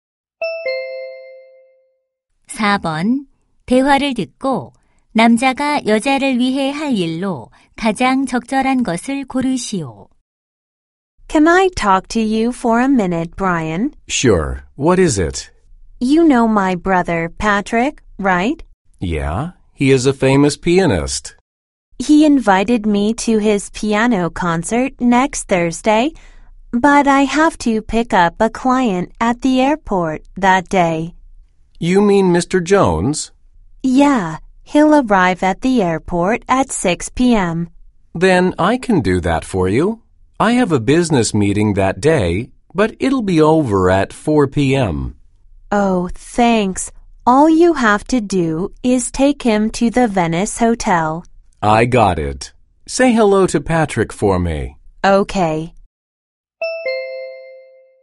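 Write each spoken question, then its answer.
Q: 대화를 듣고 남자가 여자를 위해 할 일로 가장 적절한 것을 고르시오.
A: 공항에서 고객(Mr. Jones)을 태워 호텔에 데려다주기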